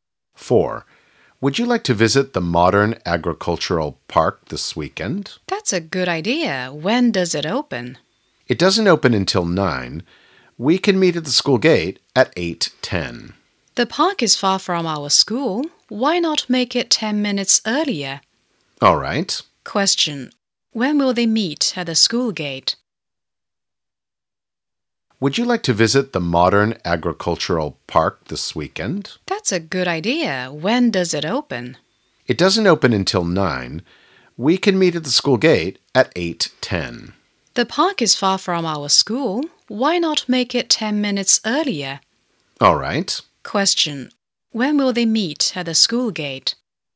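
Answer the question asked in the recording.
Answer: At 8:00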